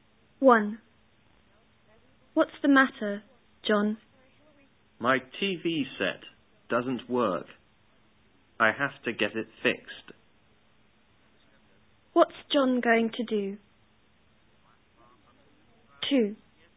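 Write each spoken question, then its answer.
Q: What's John going to do?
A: Get his TV set fixed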